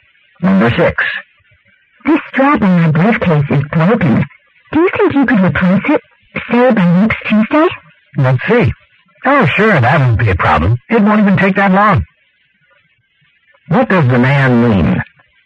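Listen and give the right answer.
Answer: He can replace the strap before Tuesday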